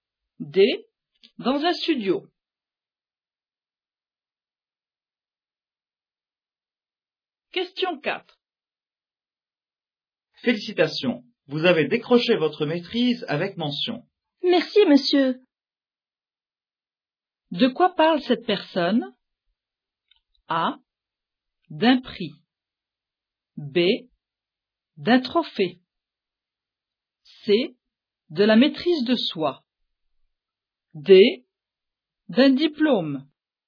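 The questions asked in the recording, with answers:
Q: De quoi parle cette personne?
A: D: D'un diplôme.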